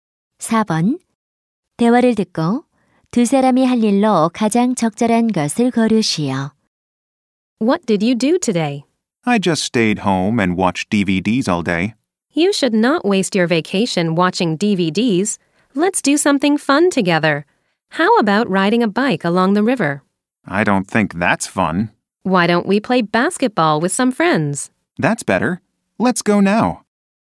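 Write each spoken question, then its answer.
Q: 대화를 듣고 두 사람이 할 일로 가장 적절한 것을 고르시오.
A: 친구들과 농구하기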